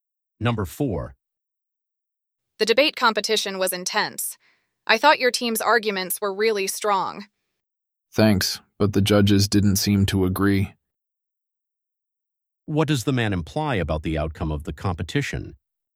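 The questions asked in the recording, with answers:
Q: What does the man imply about the outcome of the competition?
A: His team did not win.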